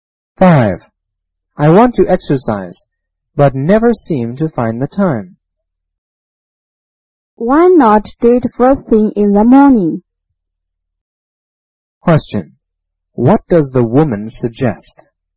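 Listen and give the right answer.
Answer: Exercising first thing in the morning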